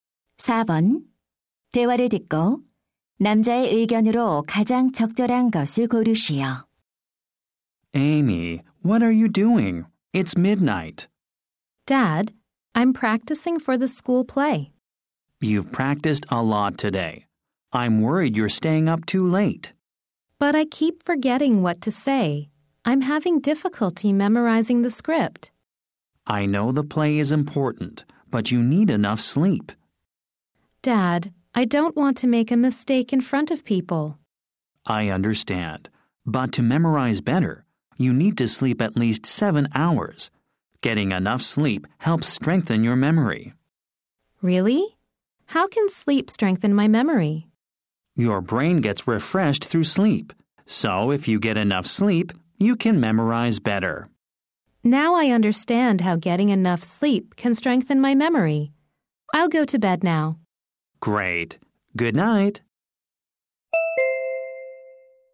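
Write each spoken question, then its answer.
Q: 대화를 듣고 남자의 의견으로 가장 적절한 것을 고르시오.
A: 충분한 수면은 기억력을 강화하는 데 도움이 된다.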